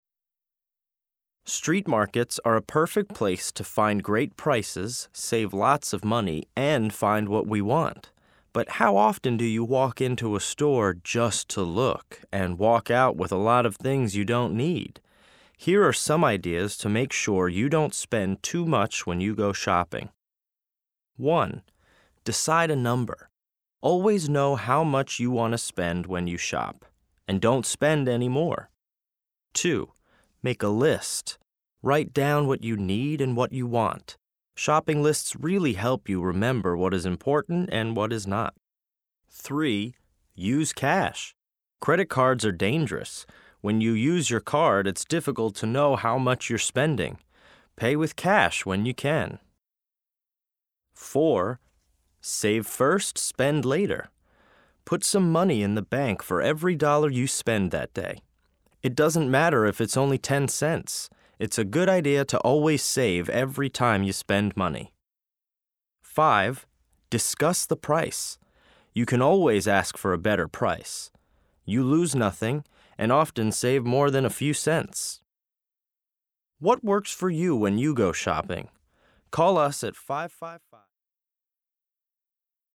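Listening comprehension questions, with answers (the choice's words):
LISTEN FOR DETAIL Listen to the radio program again. Match the phrases to the correct topic.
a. Use cash.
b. Save first, spend later.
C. Make a list.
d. Decide a number.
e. Discuss the price.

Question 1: Know how much you want to spend.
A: Decide a number.

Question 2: Credit cards are dangerous.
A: Use cash.

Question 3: Put a little in the bank.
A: Save first, spend later.

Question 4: You lose nothing when you ask.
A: Discuss the price.

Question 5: Write down what you need and want.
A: Make a list.

Listen to the radio program. Circle the correct words to complete the sentences.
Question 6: The program is about street markets / smart shopping.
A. street markets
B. smart shopping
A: smart shopping

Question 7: The speaker thinks shopping lists are / aren't a good idea.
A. are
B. aren't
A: are

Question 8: It is / is not a good idea to pay with credit cards.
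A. is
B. is not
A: is not

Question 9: It's a good idea to never / always save every time you shop.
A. never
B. always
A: always

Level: A2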